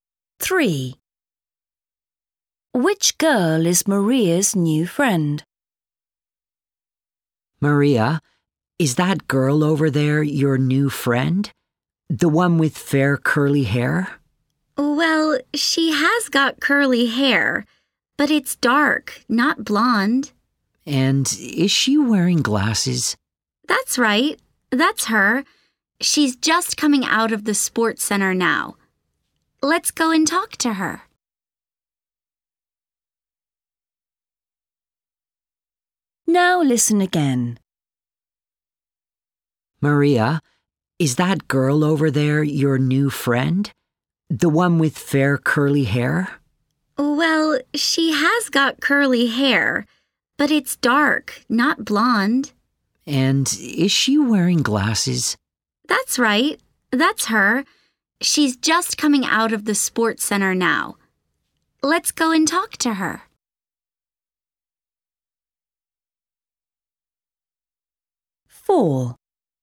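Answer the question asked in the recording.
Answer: the girl with dark curly hair and glasses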